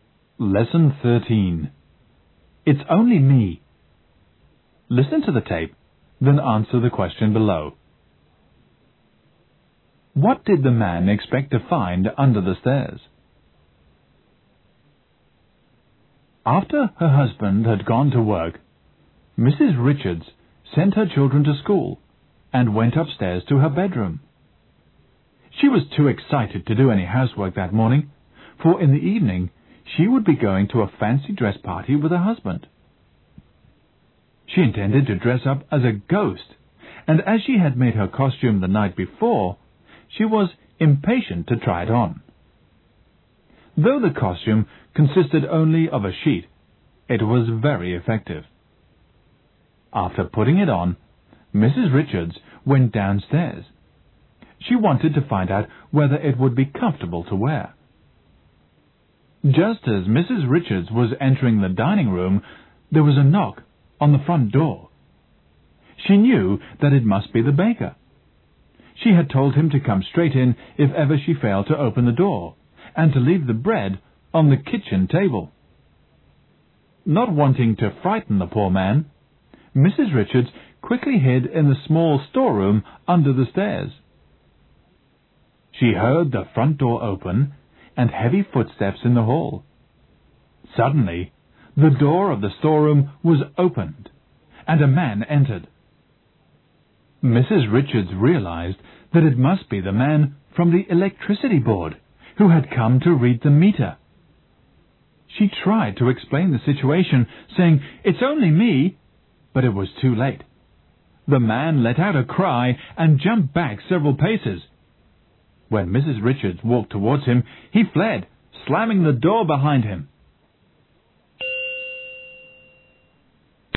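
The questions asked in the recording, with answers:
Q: What did the man expect to find under the stairs?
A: The electricity meter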